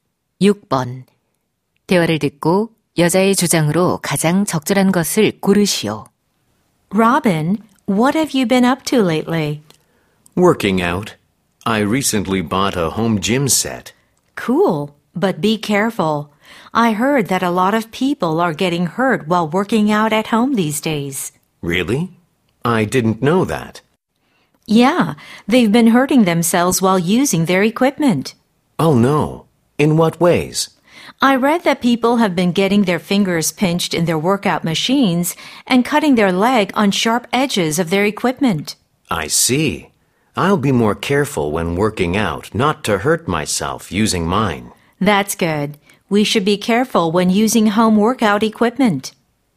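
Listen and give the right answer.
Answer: 홈트레이닝 기구 사용 시 부상에 주의해야 한다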